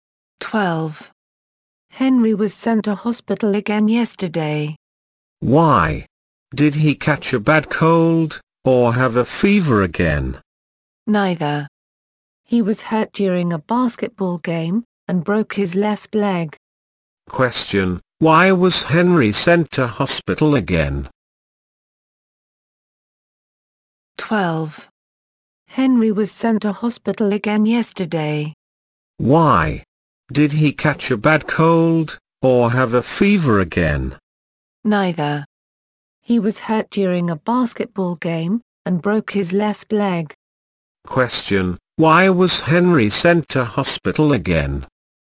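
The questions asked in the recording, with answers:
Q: Question, why was Henry sent to hospital again?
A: He broke his left leg in a basketball game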